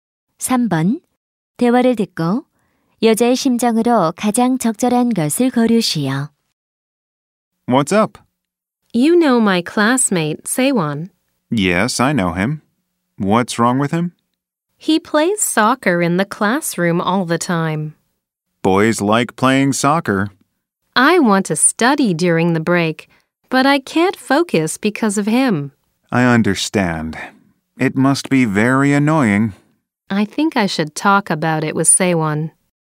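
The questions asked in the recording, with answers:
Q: 대화를 듣고 여자의 심정으로 가장 적절한 것을 고르시오.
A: 짜증남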